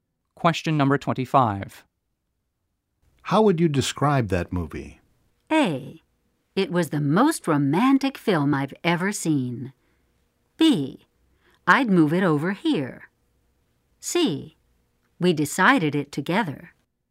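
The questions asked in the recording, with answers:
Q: How would you describe that movie?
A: A: It was the most romantic film I've ever seen.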